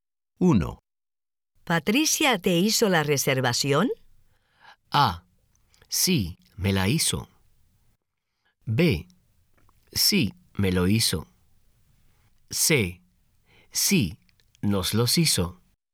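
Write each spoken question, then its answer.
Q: ¿Patricia te hizo la reservación?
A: A: Sí, me la hizo.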